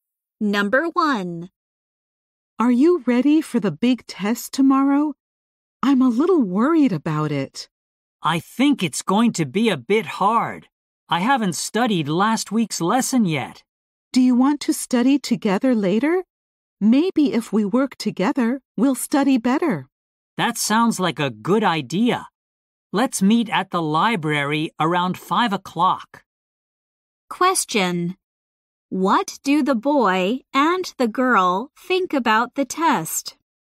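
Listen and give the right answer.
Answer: It will be a bit hard.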